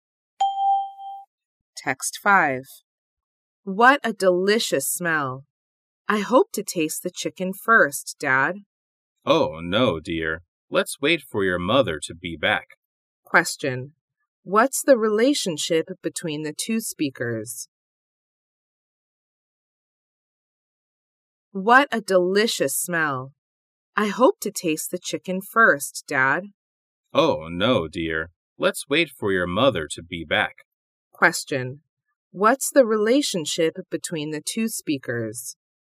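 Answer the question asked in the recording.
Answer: Father and child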